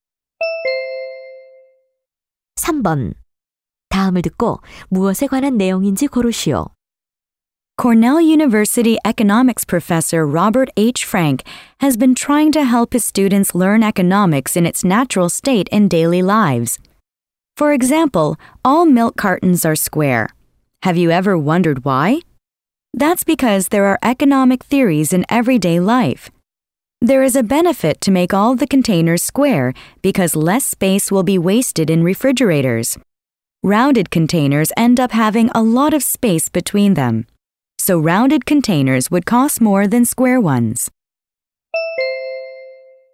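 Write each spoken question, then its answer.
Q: 다음을 듣고 무엇에 관한 내용인지 고르시오.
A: 일상생활 속 경제 원리 (우유갑이 네모난 이유)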